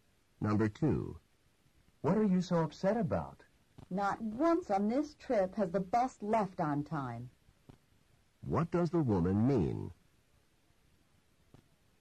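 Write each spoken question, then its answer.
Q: What does the woman mean?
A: The bus has never left on time on this trip.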